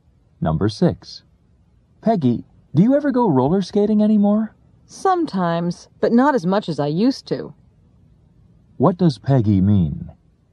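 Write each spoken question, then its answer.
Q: What does Peggy mean?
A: She goes roller skating less often than she used to.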